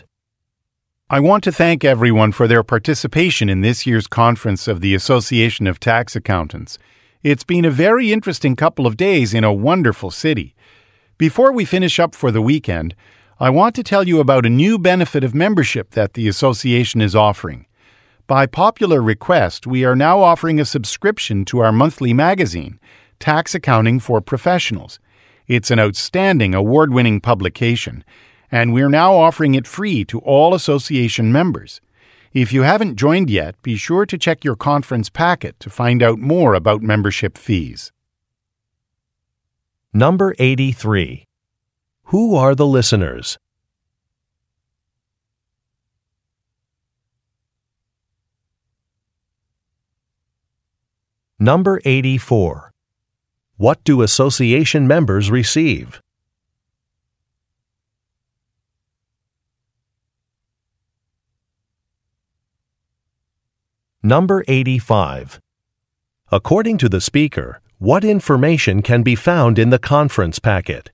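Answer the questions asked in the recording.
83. Tax accountants attending a conference
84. A free subscription to the monthly magazine
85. Membership fees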